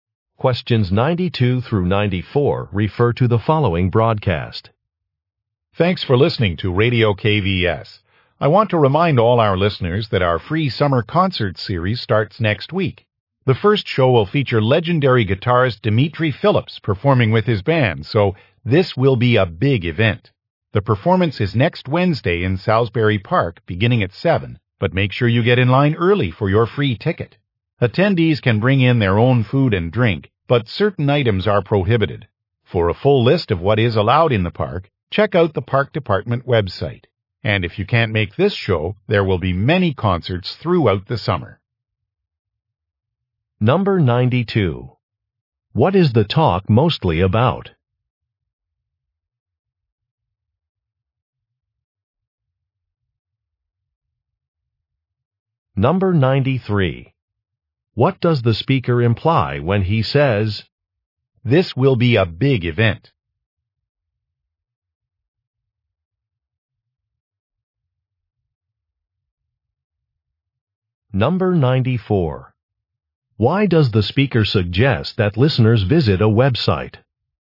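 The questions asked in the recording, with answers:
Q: What is the talk mostly about?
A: A free summer concert series

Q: Why does the speaker suggest that listeners visit a website?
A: To see a list of items allowed in the park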